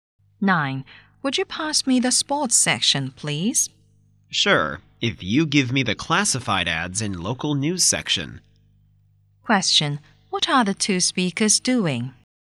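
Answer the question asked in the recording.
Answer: Reading a newspaper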